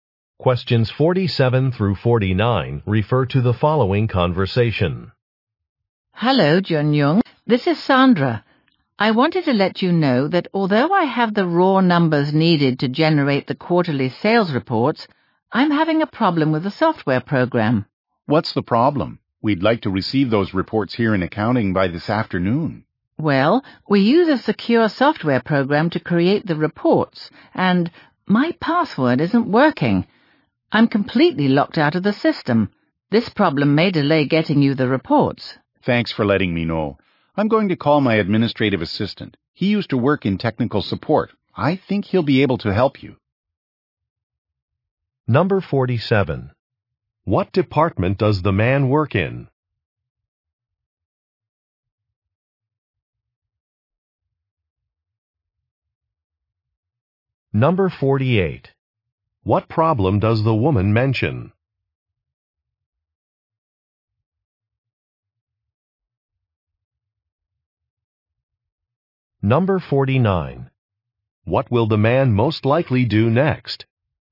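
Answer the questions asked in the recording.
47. Accounting
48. Her password isn't working for the software
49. Call his administrative assistant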